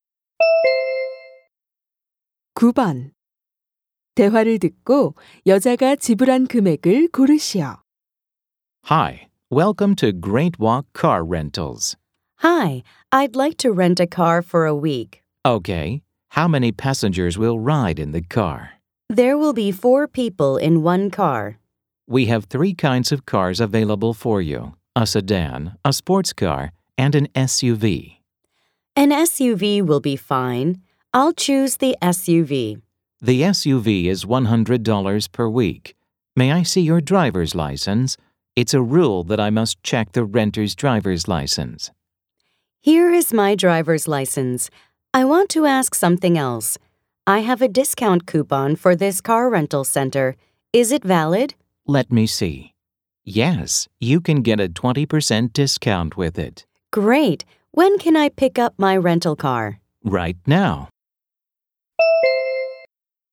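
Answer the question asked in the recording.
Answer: $80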